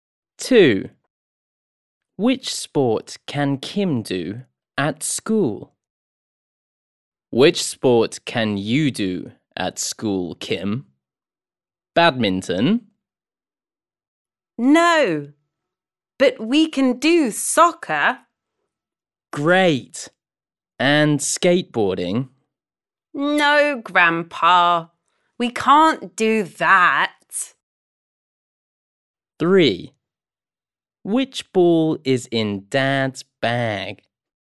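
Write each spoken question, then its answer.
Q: Which sport can Kim do at school?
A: soccer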